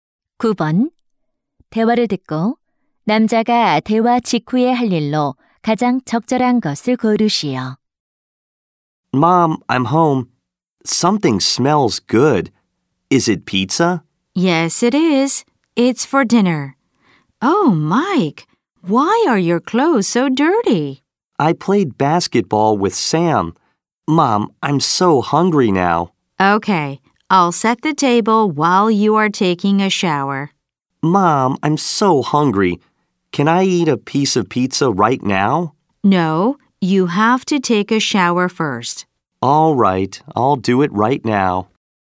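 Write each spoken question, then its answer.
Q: 대화를 듣고 남자가 대화 직후에 할 일로 가장 적절한 것을 고르시오.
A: 샤워하기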